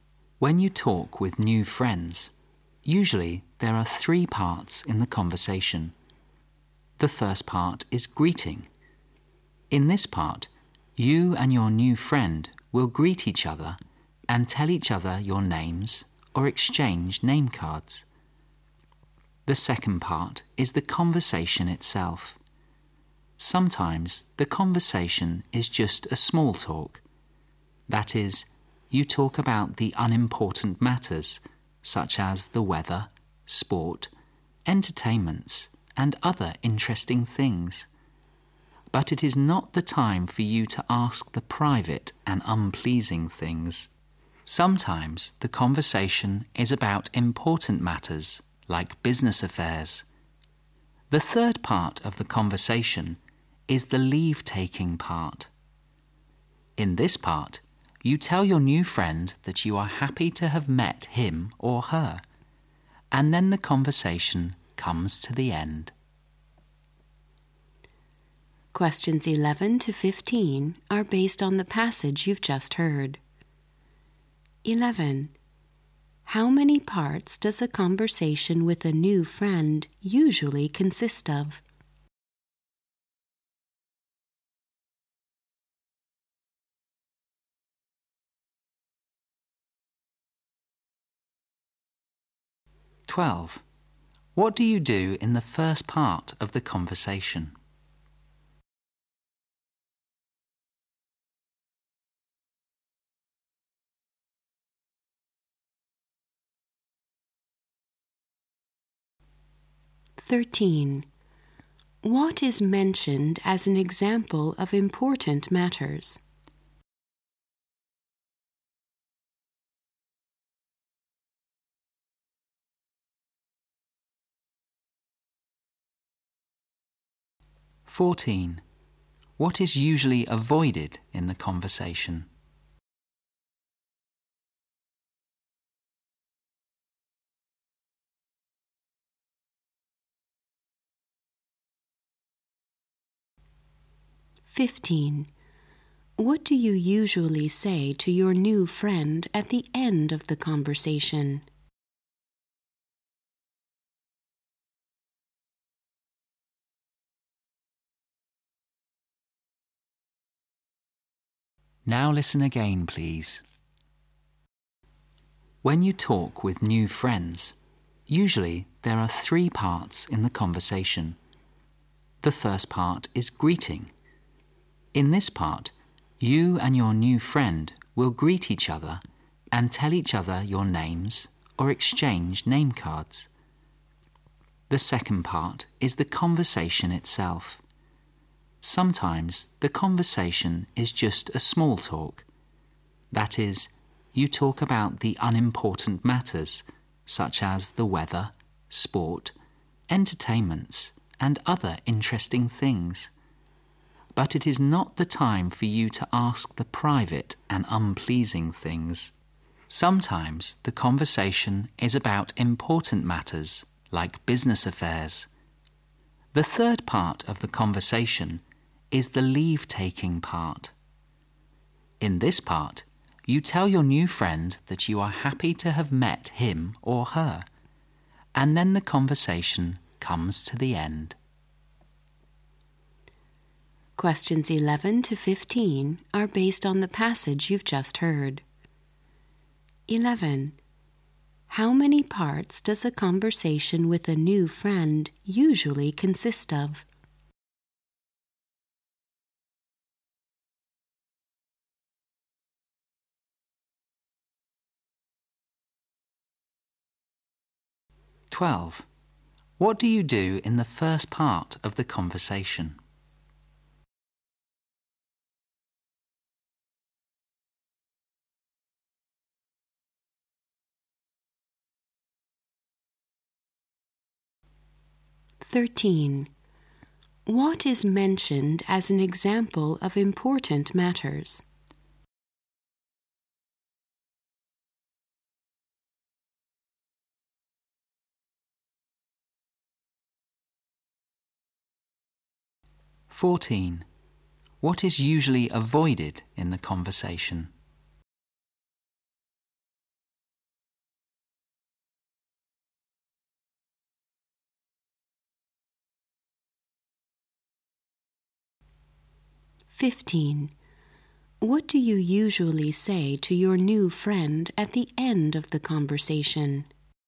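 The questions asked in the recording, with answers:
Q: How many parts does a conversation with a new friend usually consist of?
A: Three.

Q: What do you do in the first part of the conversation?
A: Greet each other.

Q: What is mentioned as an example of important matters?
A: Business affairs.

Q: What is usually avoided in the conversation?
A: Private and unpleasing things.

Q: What do you usually say to your new friend at the end of the conversation?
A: That you are happy to have met him or her.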